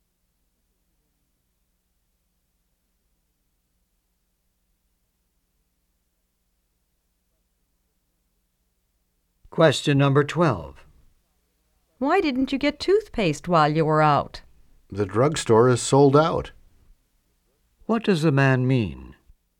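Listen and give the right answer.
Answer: The drugstore had no toothpaste left.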